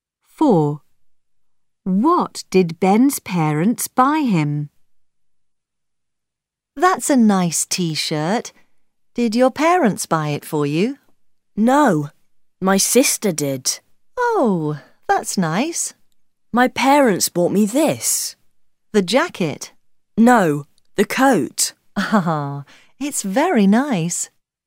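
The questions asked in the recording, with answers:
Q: What did Ben's parents buy him?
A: a coat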